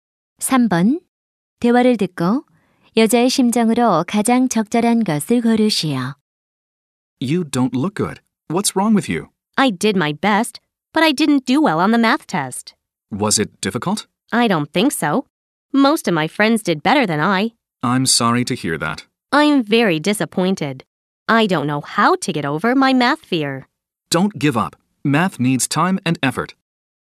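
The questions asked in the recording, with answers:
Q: 대화를 듣고 여자의 심정으로 가장 적절한 것을 고르시오.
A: 실망함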